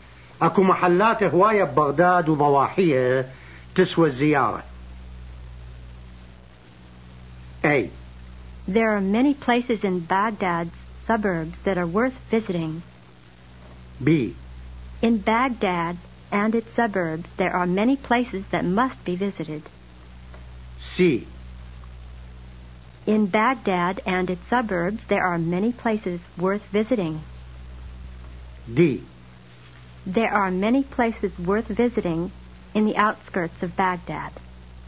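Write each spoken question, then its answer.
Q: أكو محلات هواية بغداد وضواحية تسوى الزيارة.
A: C: In Baghdad and its suburbs, there are many places worth visiting.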